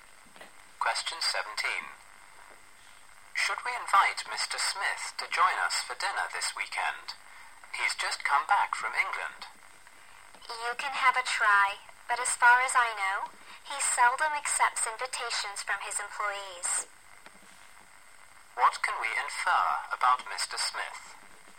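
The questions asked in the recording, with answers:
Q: What can we infer about Mr.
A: He will probably not accept the invitation.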